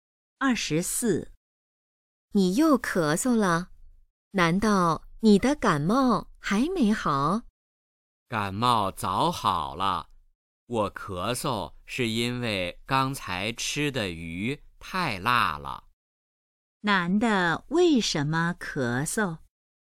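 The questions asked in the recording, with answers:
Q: 男的为什么咳嗽?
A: 吃的鱼太辣了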